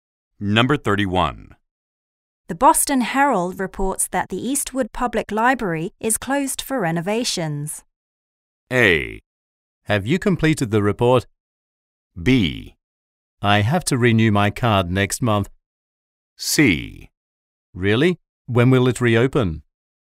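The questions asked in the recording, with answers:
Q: The Boston Herald reports that the Eastwood Public Library is closed for renovations.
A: C: Really? When will it reopen?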